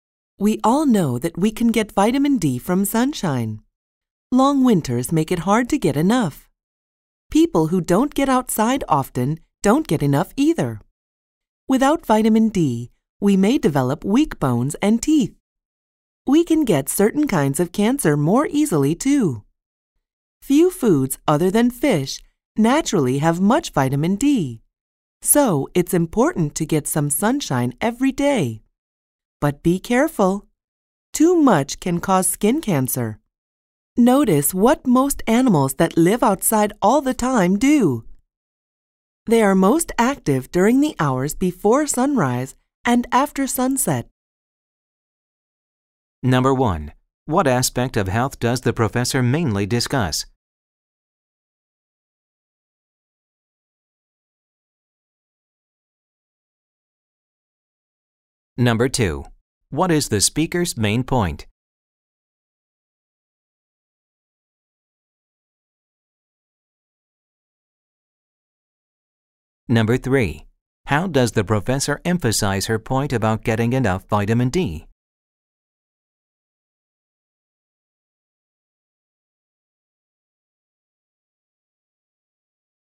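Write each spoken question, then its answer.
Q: What aspect of health does the professor mainly discuss?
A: Getting enough vitamin D from sunshine

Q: What is the speaker's main point?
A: It's important to get some sunshine every day, but not too much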